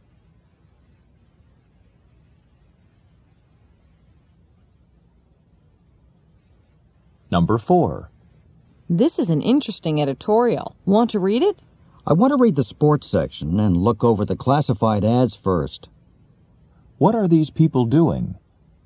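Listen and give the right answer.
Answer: Reading a newspaper.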